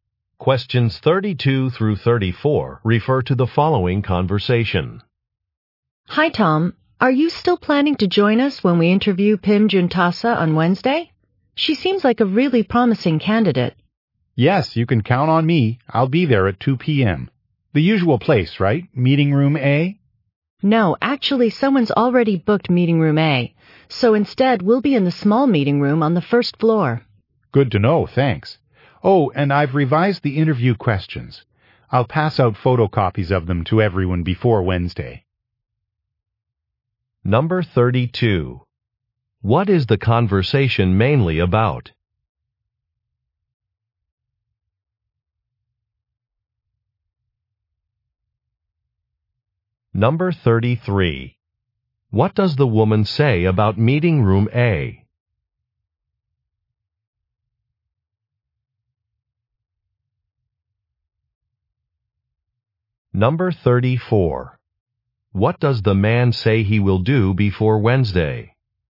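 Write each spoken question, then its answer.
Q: What is the conversation mainly about?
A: A job interview with a candidate on Wednesday

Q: What does the woman say about meeting room A?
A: It has already been booked

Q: What does the man say he will do before Wednesday?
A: Hand out copies of the revised interview questions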